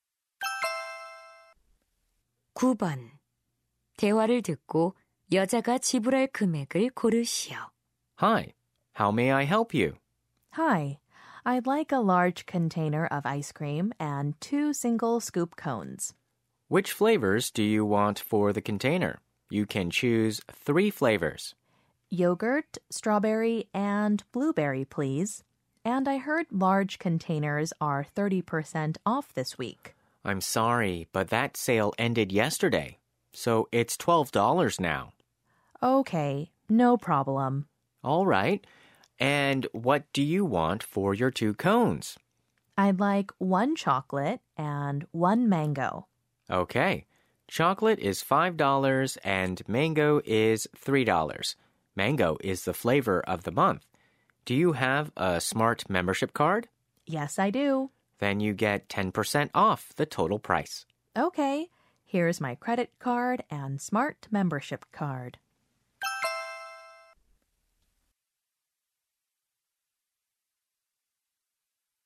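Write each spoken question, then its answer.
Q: 대화를 듣고 여자가 지불할 금액을 고르시오.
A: $18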